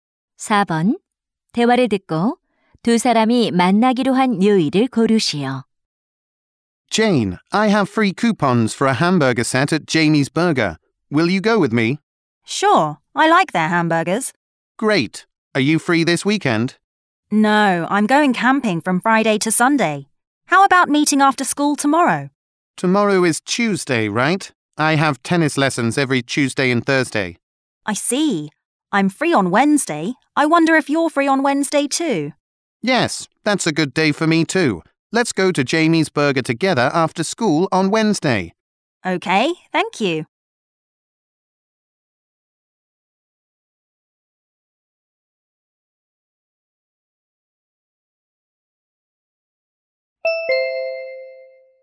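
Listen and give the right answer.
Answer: 수요일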